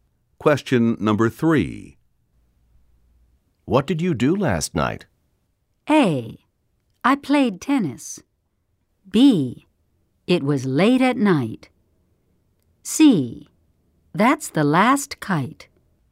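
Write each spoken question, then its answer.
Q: What did you do last night?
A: A: I played tennis.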